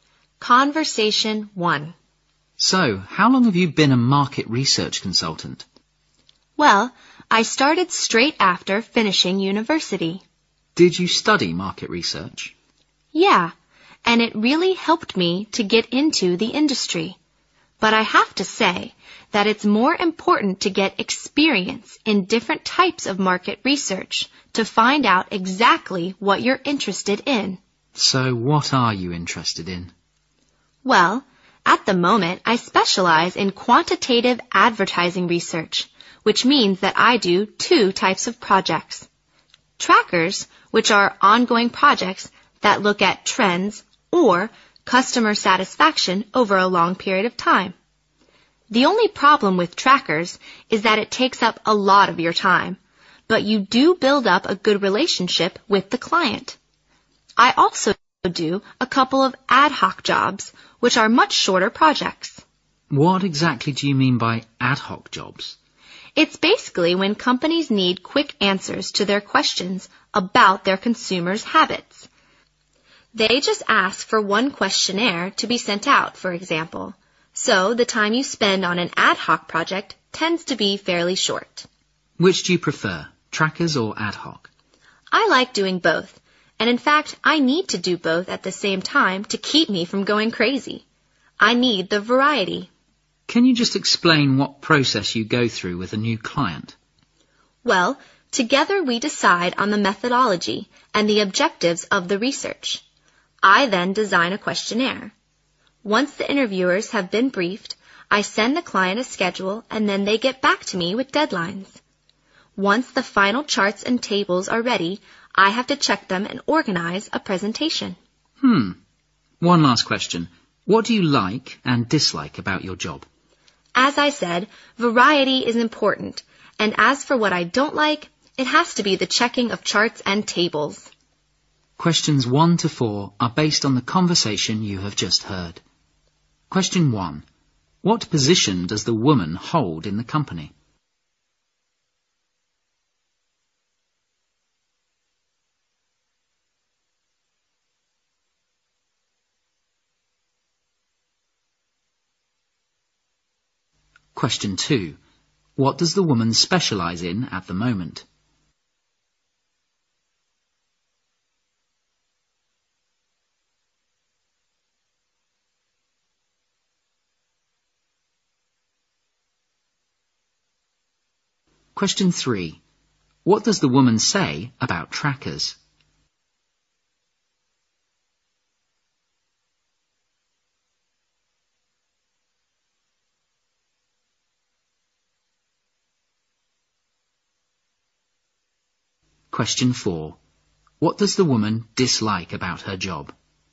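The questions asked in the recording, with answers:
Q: What position does the woman hold in the company?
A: Market research consultant

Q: What does the woman specialize in at the moment?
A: Quantitative advertising research

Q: What does the woman say about trackers?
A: They take up a lot of time but help build good relationships with clients

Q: What does the woman dislike about her job?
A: Checking charts and tables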